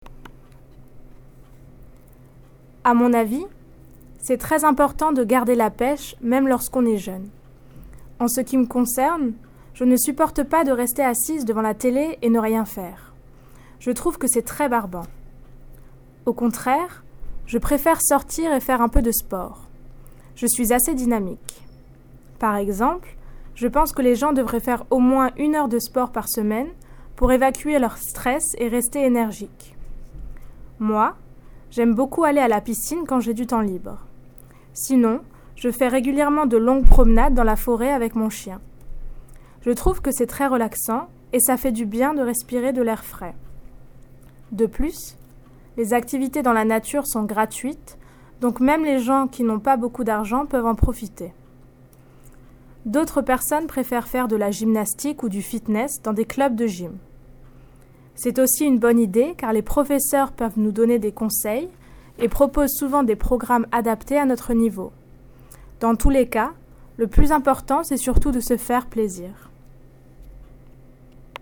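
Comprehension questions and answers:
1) What does Sarah find annoying with regards to physical activity?(2)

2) What does she enjoy doing instead? (1)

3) Why does she think this is a good idea?(1)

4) What sports does Sarah do? (2)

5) What benefits does she find in exercising? (3)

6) Why does she think it is a good idea for people to go to gym classes? (2)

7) What does she think is the most important thing about exercising? (1)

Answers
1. Sitting in front of the TV doing nothing; it is boring
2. Going out and doing some sport
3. To get rid of stress and stay energetic
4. Swimming and long walks in the forest with her dog
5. Relaxing, breathing fresh air, and nature activities are free
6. Teachers give advice and offer programmes adapted to your level
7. Enjoying yourself

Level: New Higher French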